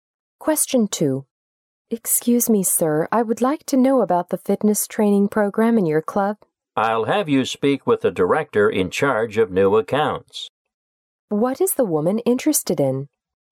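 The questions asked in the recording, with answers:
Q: What is the woman interested in?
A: The fitness training program in the club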